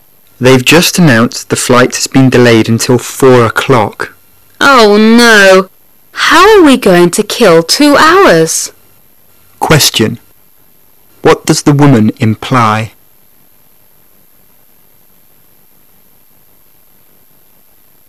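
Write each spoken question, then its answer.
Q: What does the woman imply?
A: They have to wait two hours, and she doesn't know what to do in the meantime.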